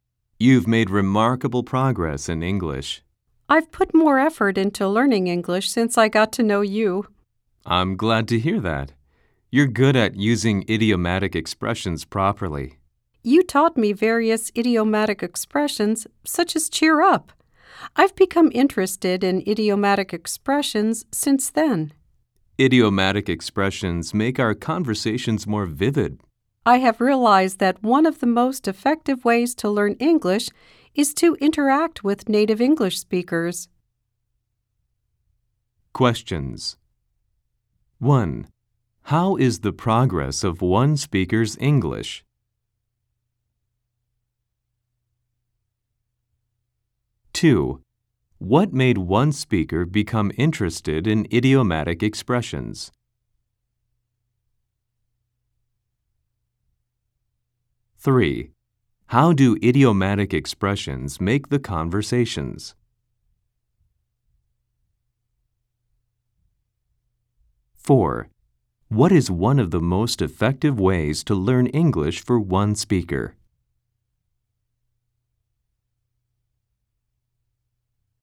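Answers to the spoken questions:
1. Remarkable progress
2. Being taught idiomatic expressions like "cheer up" by the other speaker
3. More vivid
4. Interacting with native English speakers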